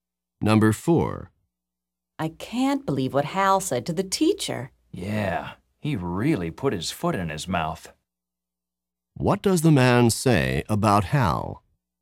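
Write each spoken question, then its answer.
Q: What does the man say about Hal?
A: Hal said something embarrassing or inappropriate to the teacher.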